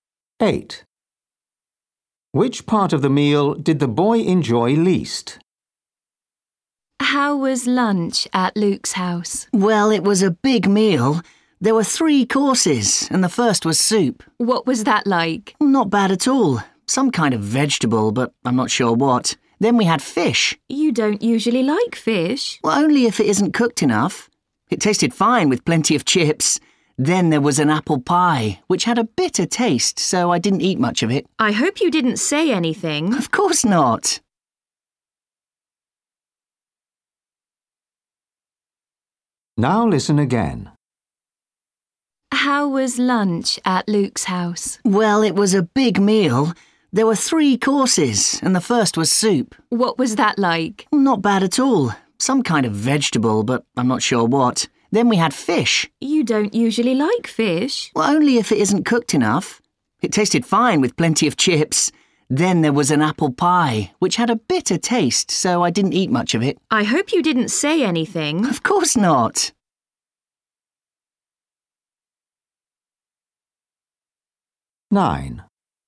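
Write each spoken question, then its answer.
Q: Which part of the meal did the boy enjoy least?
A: the apple pie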